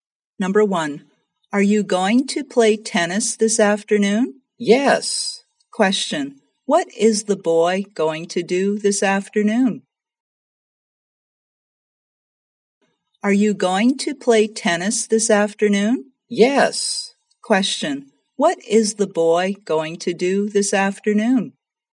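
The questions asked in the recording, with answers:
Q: what is the boy going to do this afternoon?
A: Play tennis.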